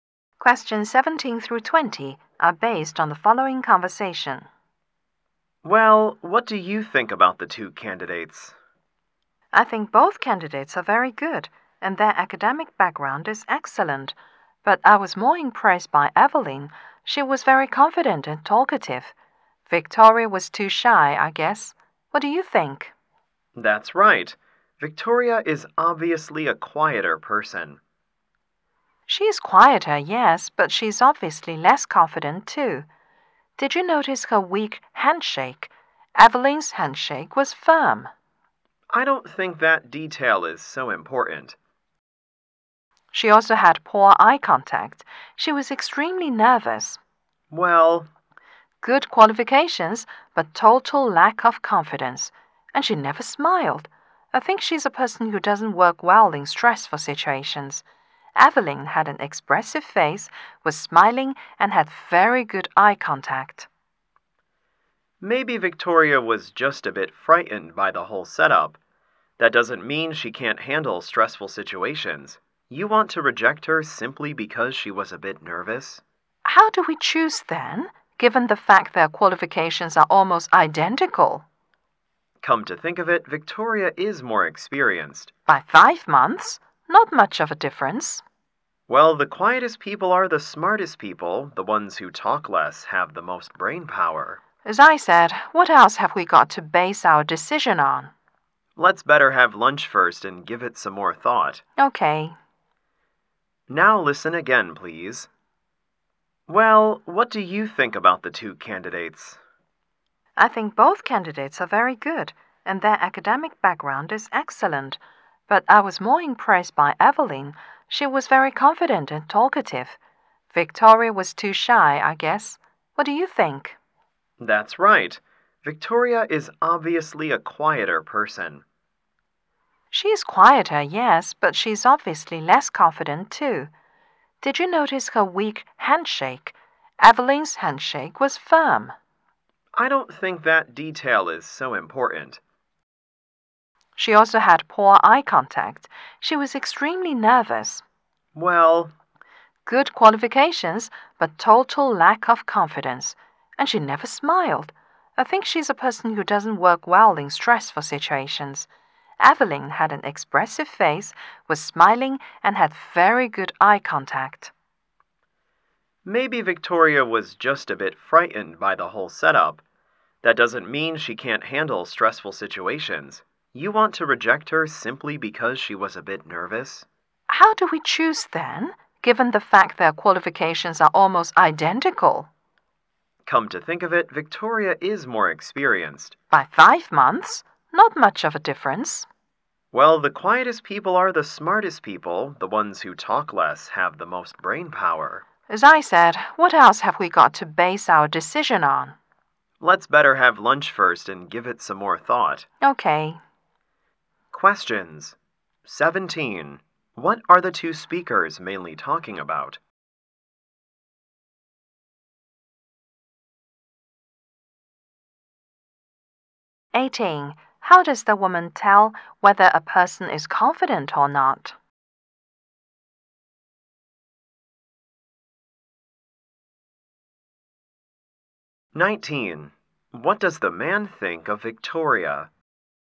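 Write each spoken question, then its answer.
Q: What are the two speakers mainly talking about?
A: Which of two job candidates to choose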